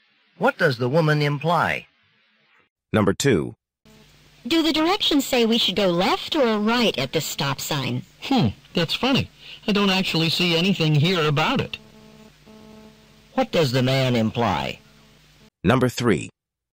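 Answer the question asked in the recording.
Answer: The directions don't say which way to turn at the stop sign.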